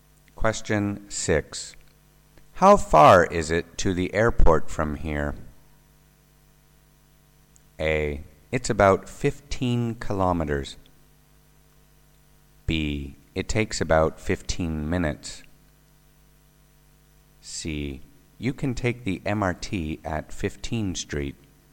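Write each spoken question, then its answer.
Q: How far is it to the airport from here?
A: A: It's about 15 kilometers.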